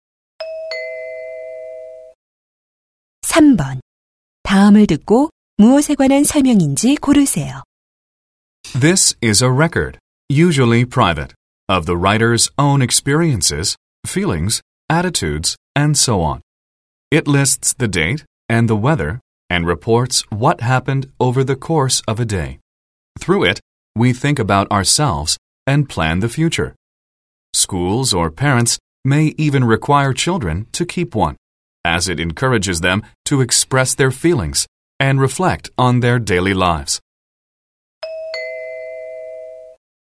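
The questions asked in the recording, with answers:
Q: 다음을 듣고 무엇에 관한 설명인지 고르세요.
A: 일기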